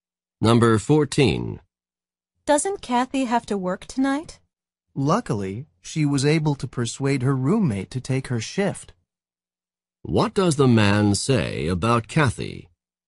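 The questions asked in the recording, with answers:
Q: What does the man say about Kathy?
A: Her roommate will work her shift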